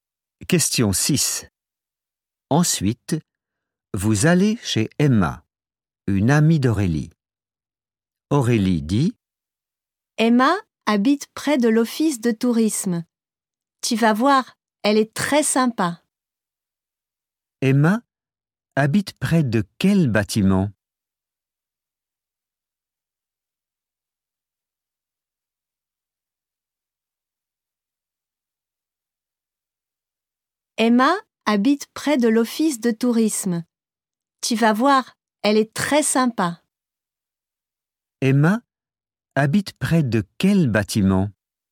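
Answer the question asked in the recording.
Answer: L'office de tourisme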